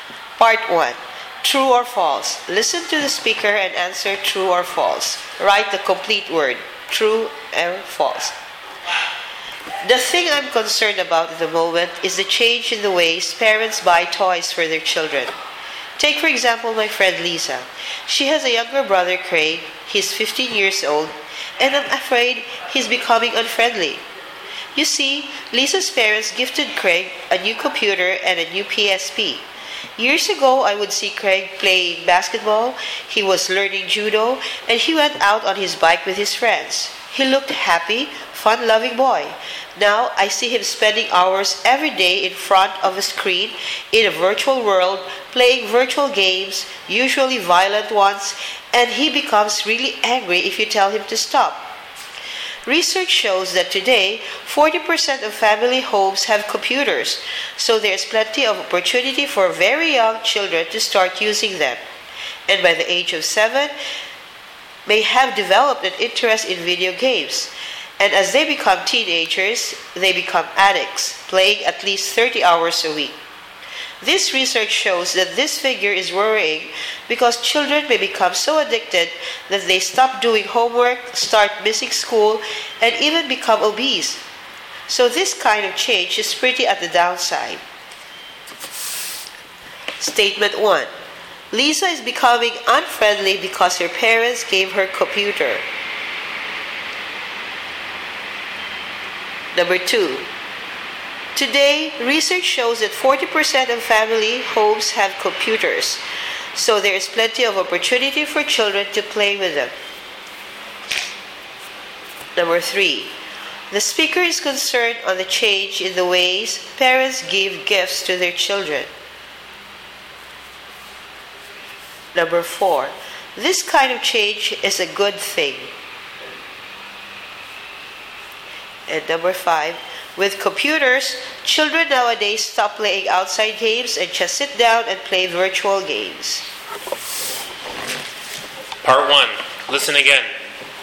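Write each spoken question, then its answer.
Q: Lisa is becoming unfriendly because her parents gave her a computer.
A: False

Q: Today, research shows that 40% of family homes have computers, so there is plenty of opportunity for children to play with them.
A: True

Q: The speaker is concerned on the change in the ways parents give gifts to their children.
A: True

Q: This kind of change is a good thing.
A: False

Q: With computers, children nowadays stop playing outside games and just sit down and play virtual games.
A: True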